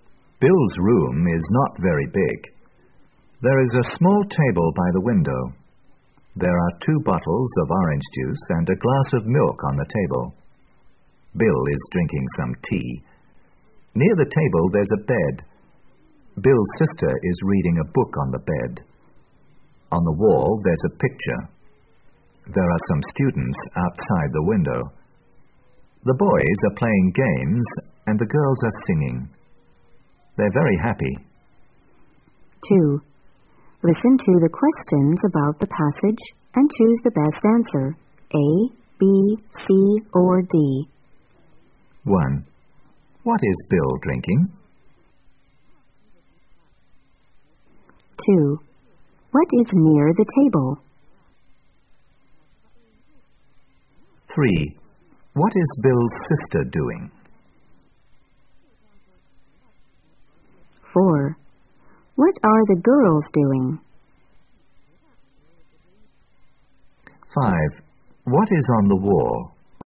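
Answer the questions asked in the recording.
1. Some tea
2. A bed
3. Reading a book on the bed
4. Singing
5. A picture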